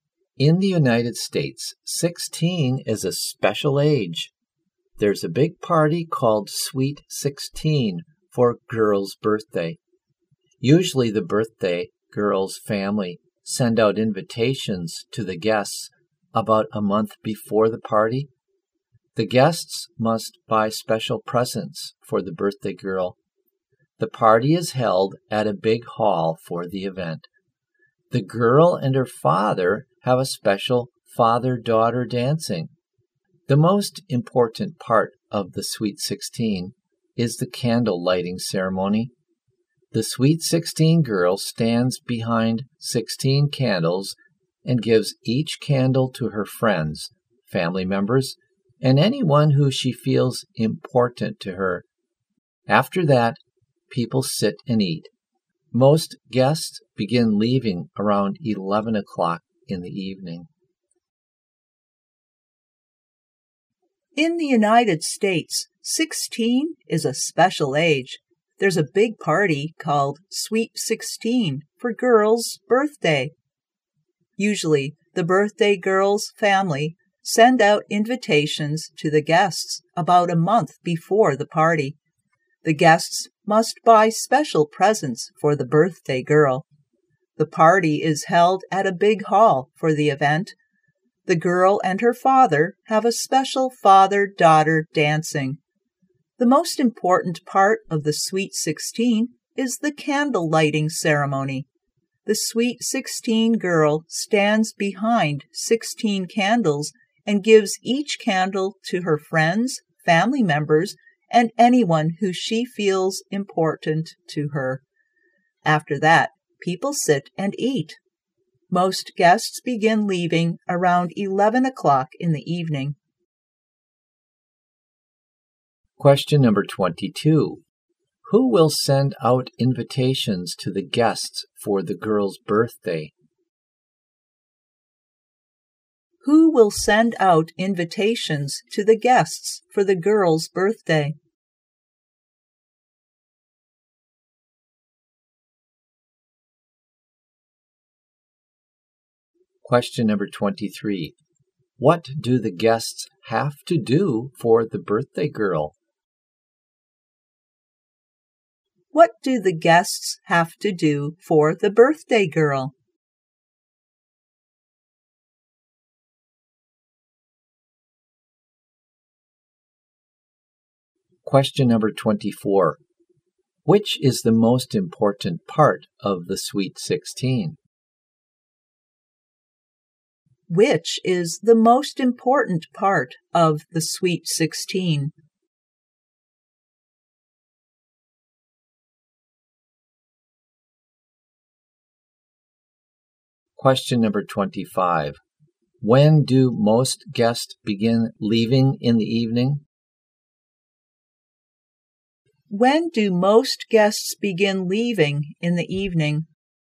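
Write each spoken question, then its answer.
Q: Who will send out invitations to the guests for the girl's birthday?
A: The birthday girl's family

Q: What do the guests have to do for the birthday girl?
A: Buy special presents

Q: Which is the most important part of the Sweet 16?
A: The candle lighting ceremony

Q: When do most guests begin leaving in the evening?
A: Around 11 o'clock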